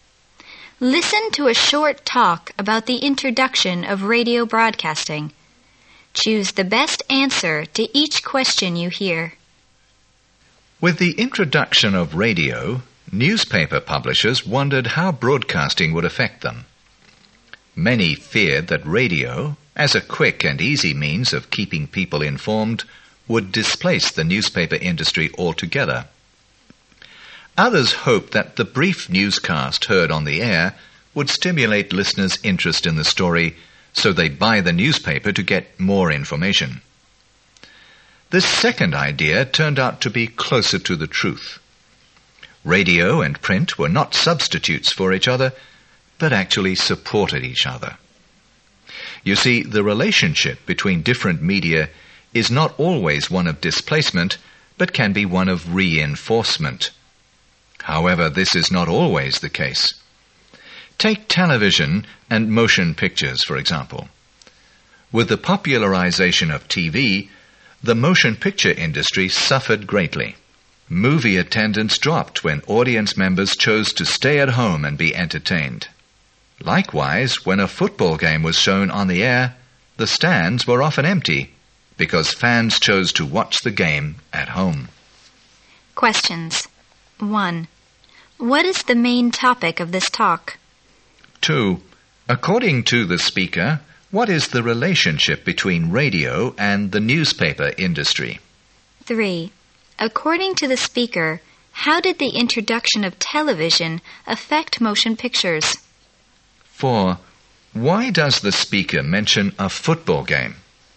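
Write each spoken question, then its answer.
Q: What is the main topic of this talk?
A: How new media such as radio and television affected existing media

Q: According to the speaker, what is the relationship between radio and the newspaper industry?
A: They supported and reinforced each other

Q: According to the speaker, how did the introduction of television affect motion pictures?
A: The film industry suffered greatly because fewer people went to the movies

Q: Why does the speaker mention a football game?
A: As another example of TV displacing live attendance: fans watched at home and left the stands empty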